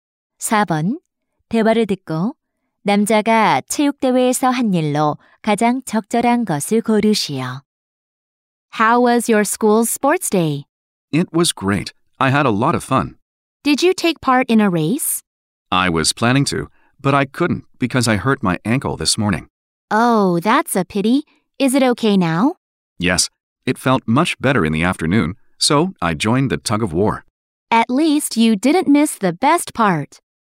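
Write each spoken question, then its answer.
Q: 대화를 듣고 남자가 체육대회에서 한 일로 가장 적절한 것을 고르시오.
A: 줄다리기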